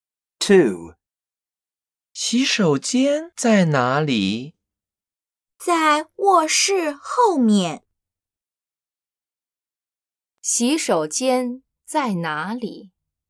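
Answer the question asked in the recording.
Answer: 在卧室后面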